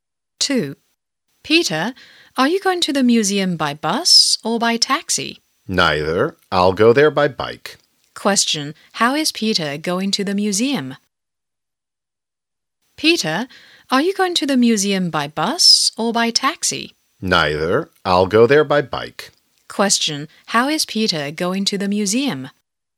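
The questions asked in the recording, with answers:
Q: How is Peter going to the museum?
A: By bike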